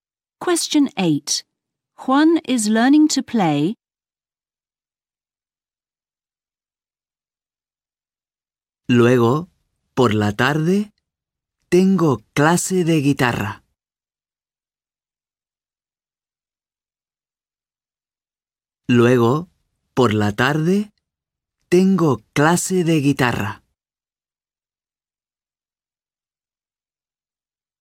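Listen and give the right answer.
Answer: the guitar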